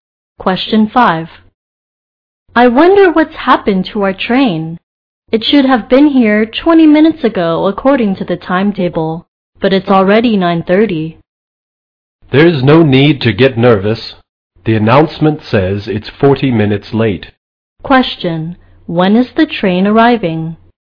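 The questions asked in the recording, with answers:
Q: When is the train arriving?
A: At 9:50.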